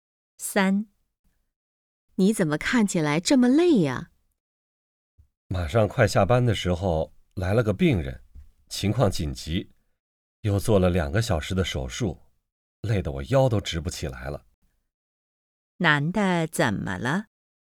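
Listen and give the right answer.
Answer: 做手术太累了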